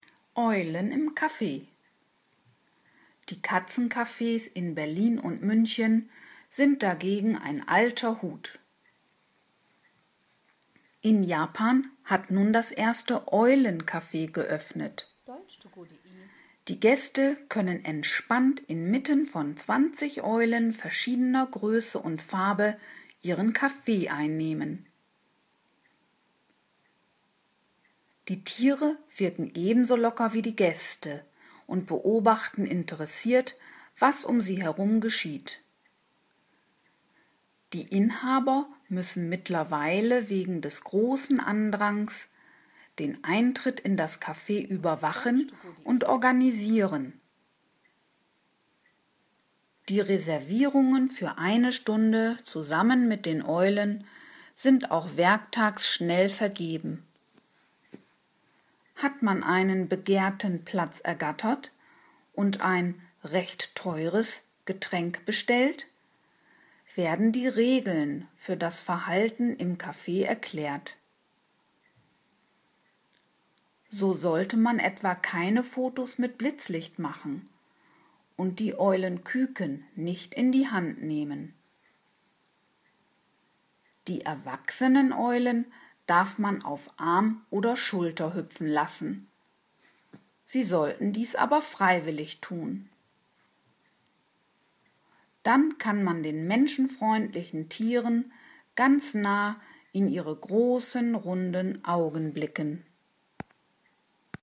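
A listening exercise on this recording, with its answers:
Haben Sie das gehört? Stimmt diese Aussage?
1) In Japan hat ein Café geöffnet, in dem sich der Gast zusammen mit Eulen aufhält.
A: Ja, das habe ich gehört.

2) Die Inhaber vergeben Eintrittszeiten für den Besuch des Cafés.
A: Ja, das habe ich gehört.

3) Die Getränke im Café sind günstig.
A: Nein, das habe ich nicht gehört.

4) Man kann sich im Café verhalten, wie man will.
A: Nein, das habe ich nicht gehört.

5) Die Gäste sollen die Küken nicht in die Hand nehmen.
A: Ja, das habe ich gehört.

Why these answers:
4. Es werden dem Gast Verhaltensregeln erklärt.

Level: B1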